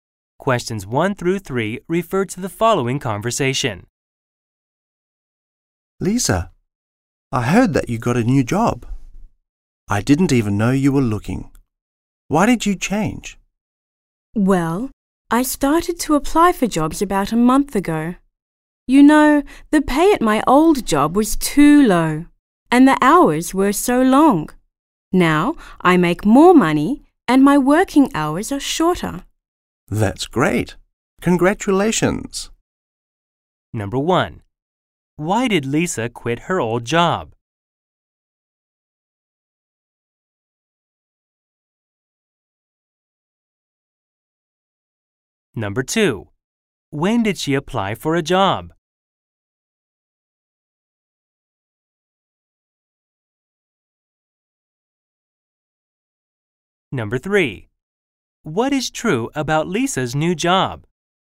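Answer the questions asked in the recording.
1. The pay was too low and the hours were too long
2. About a month ago
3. She makes more money and works shorter hours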